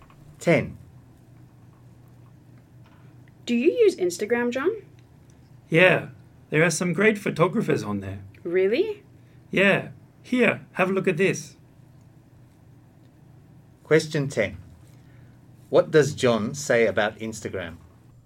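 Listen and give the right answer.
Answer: There are some great photographers on it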